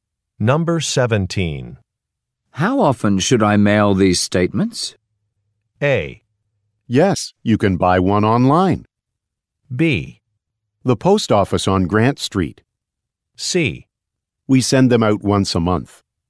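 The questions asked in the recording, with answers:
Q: How often should I mail these statements?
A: C: We send them out once a month.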